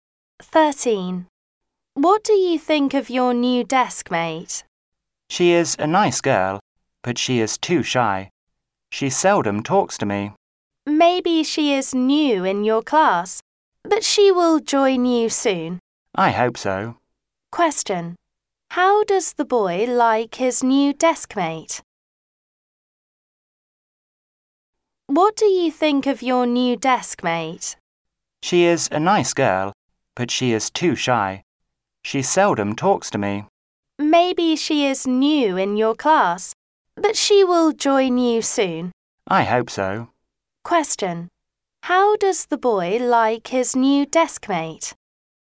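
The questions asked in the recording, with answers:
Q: How does the boy like his new deskmate?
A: She is nice but too shy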